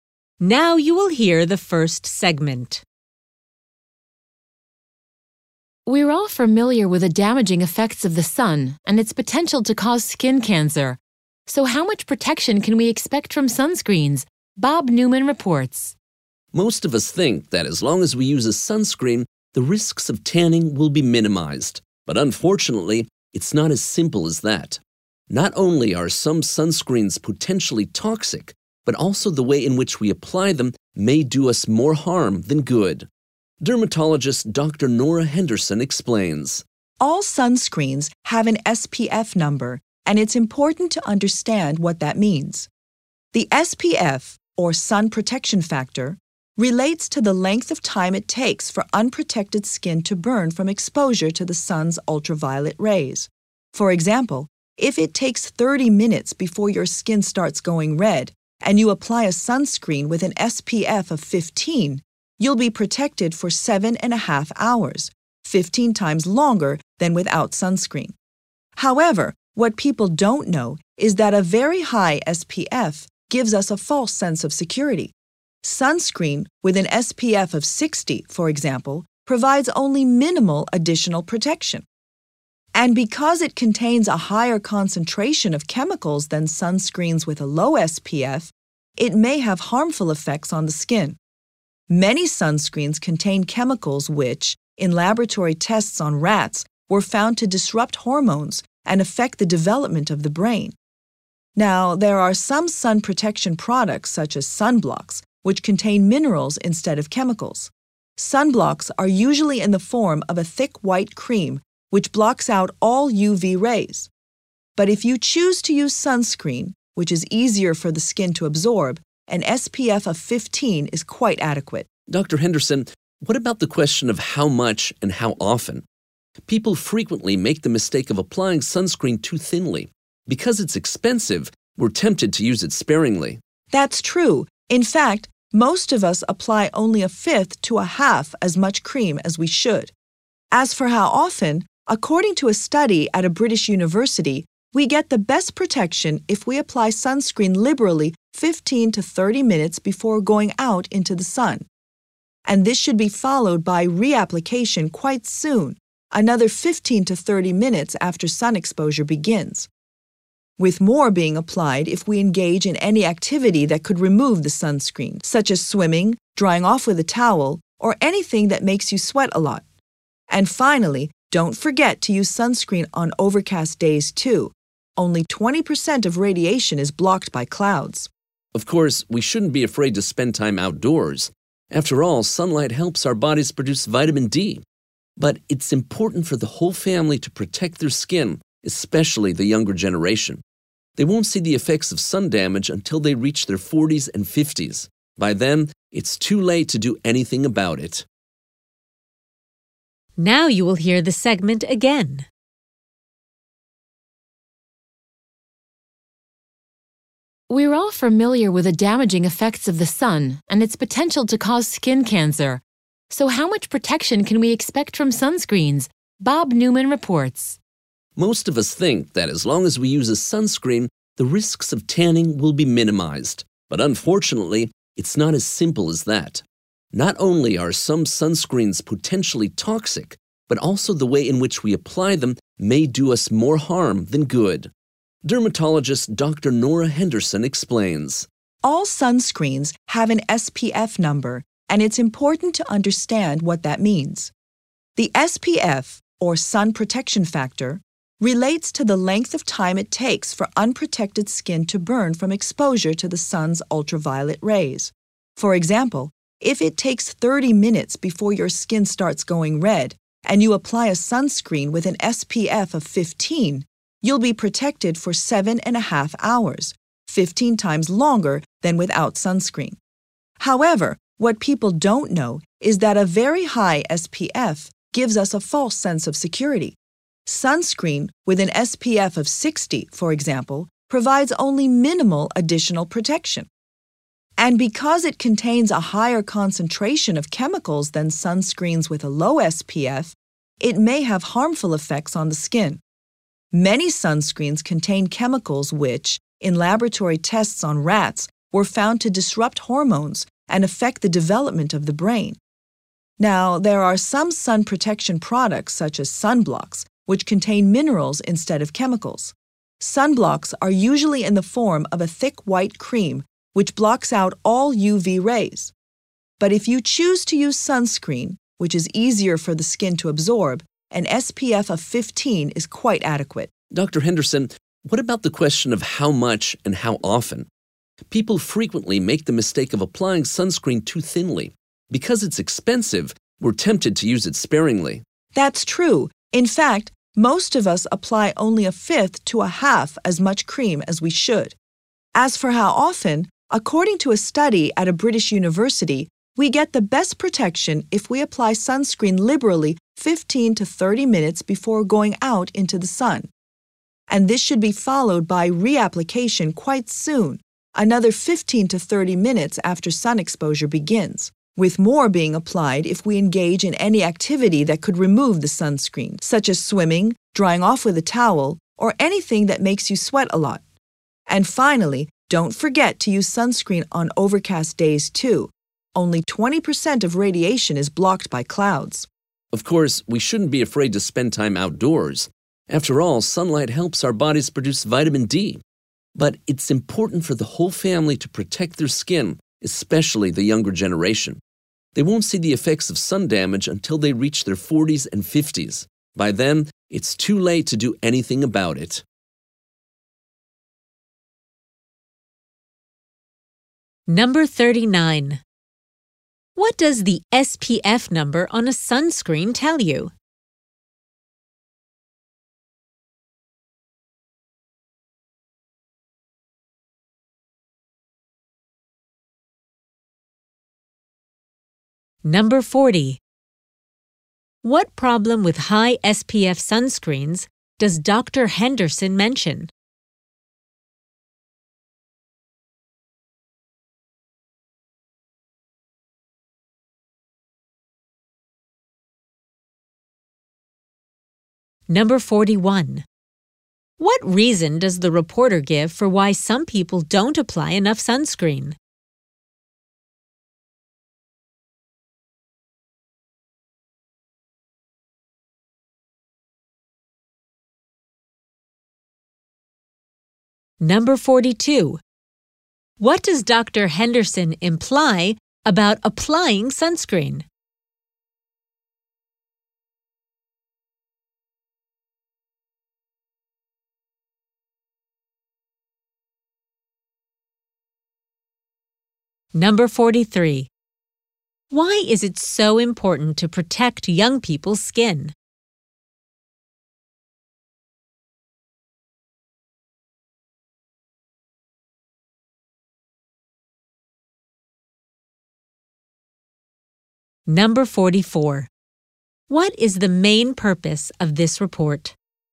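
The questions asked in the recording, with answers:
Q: What does the SPF number on a sunscreen tell you?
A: How much longer you can stay in the sun before your skin burns, compared with no sunscreen

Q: What problem with high SPF sunscreens does Dr. Henderson mention?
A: They give a false sense of security and have more chemicals that may harm the skin

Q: What reason does the reporter give for why some people don't apply enough sunscreen?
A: It is expensive

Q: Why is it so important to protect young people's skin?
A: Sun damage appears only in their 40s and 50s, when it is too late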